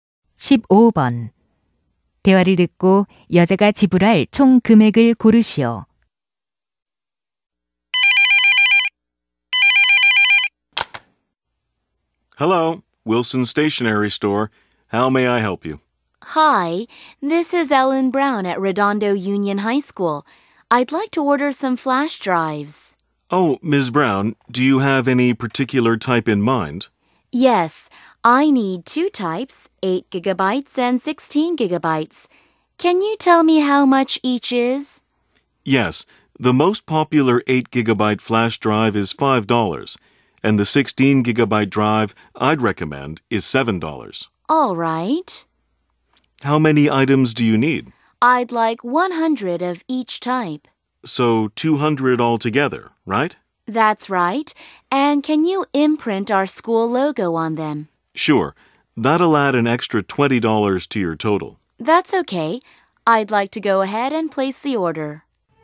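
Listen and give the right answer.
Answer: $1,220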